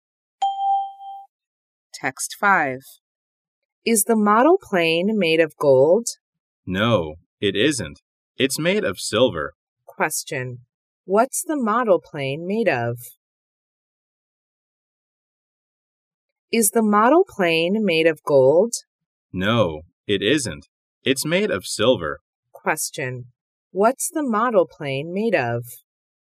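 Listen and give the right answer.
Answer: Silver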